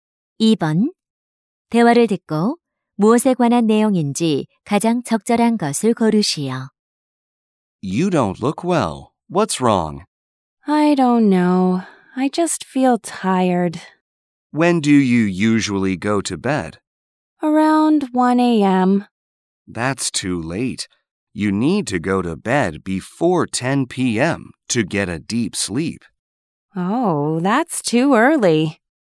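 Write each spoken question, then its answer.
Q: 대화를 듣고 무엇에 관한 내용인지 가장 적절한 것을 고르시오.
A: 잠자리에 드는 시간(수면 습관)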